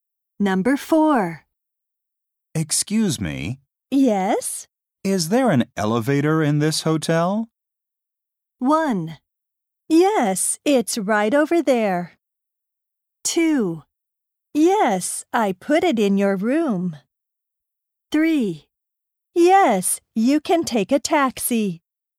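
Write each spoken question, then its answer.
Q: Is there an elevator in this hotel?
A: 1: Yes, it's right over there.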